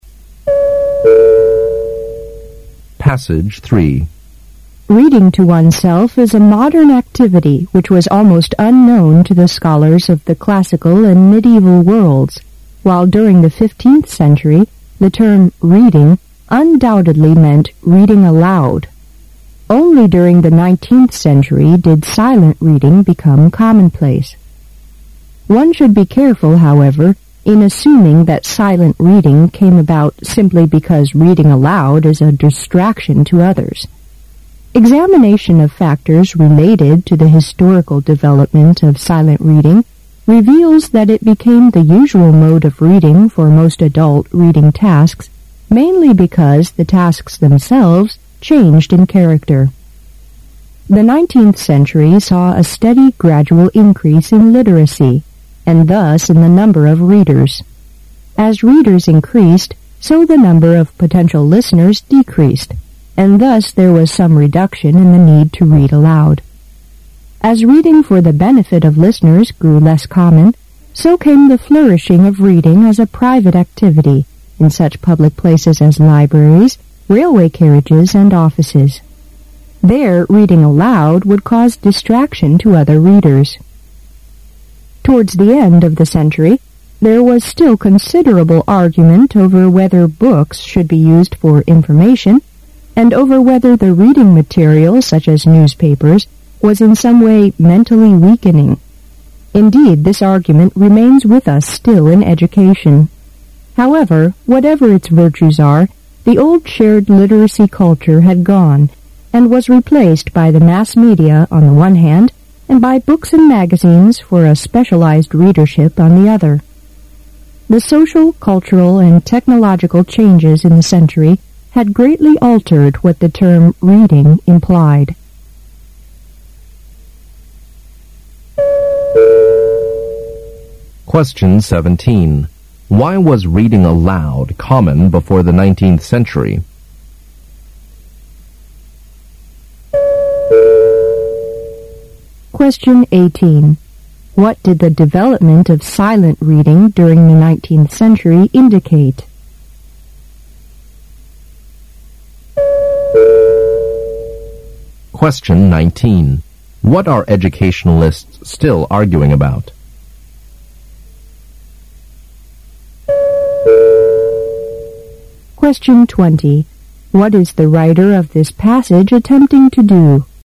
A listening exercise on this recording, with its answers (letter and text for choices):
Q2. What did the development of silent reading during the nineteenth century indicate?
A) It indicated a change in the status of literate people.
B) It indicated a change in the nature of reading.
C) It indicated an increase in the number of books.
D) It indicated an increase in the average age of readers.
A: B) It indicated a change in the nature of reading.

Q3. What are educationalists still arguing about?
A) The importance of silent reading.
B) The amount of information yielded by books and newspapers.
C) The effects of reading on health.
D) The value of different types of reading materials.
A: D) The value of different types of reading materials.

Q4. What is the writer of this passage attempting to do?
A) Explain how present-day reading habits developed.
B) Change people's attitudes to reading.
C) Show how reading methods have improved.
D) Encourage the growth of reading.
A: A) Explain how present-day reading habits developed.

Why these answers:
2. 事实细节题。第二段末句说:有关影响默读历史因素的研究表明默读成为大多数读书活动的常用方式主要是因为读书活动本身的特性改变了,故B)项"这表明读书的性质改变"正确。
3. 事实细节题。本文最后一段前两句:在十九世纪末存在很多争论,有关书是否被用于传递信息,像报纸这样的阅读材料是否会让人们的思考能力下降。而这种争论现在在教育界仍然存在,由此可知 D)项"不同阅读材料的价值"是人们争论的问题之一。
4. 主旨大意题。十九世纪前,阅读意味着大声朗读。到了十九世纪,默读成为最主要的阅读方式。作者介绍了这种转变的原因——不干扰他人及识字人群增加。最后作者谈到人们关于阅读的争议问题。因此综合来看,本篇文章谈论阅读习惯的形成问题,故A)项为本文的主旨。

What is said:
[解析] 17-20 Reading to oneself is a modern activity which was almost unknown to the scholars of the classical and medieval worlds, while during the fifteenth century the term "reading" undoubtedly meant reading aloud. Only during the nine- teenth century did silent reading become commonplace. One should be careful, however, in assuming that silent reading came about simply because reading aloud is a distraction to others. Examination of factors related to the historical development of silent reading reveals that it became the usual mode of reading for most adult reading tasks mainly because the tasks themselves changed in character. The 19th century saw a steady gradual increase in literacy, and thus in the number of readers. As readers increased, so the number of potential listeners decreased, and thus there was some reduction in the need to read aloud. As reading for the benefit of listeners grew less common, so came the flourishing of reading as a private activity in such public places as libraries, railway carriages and offices. There reading aloud would cause distraction to other readers. Towards the end of the century there was still considerable argument over whether books should be used for information, and over whether the reading material such as newspapers was in some way mentally weakening. Indeed this argument remains with us still in education. However, whatever its virtues are, the old shared literacy culture had gone and was replaced by the mass media on the one hand and by books and magazines for a specialized readership on the other. The social, cultural, and technological changes in the century had greatly altered what the term "reading" implied. 17.Why was reading aloud common before the nineteenth century?